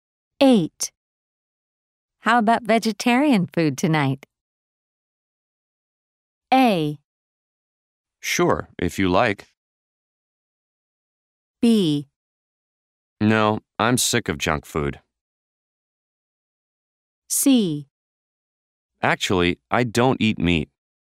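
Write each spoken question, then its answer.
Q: How about vegetarian food tonight?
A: A: Sure, if you like.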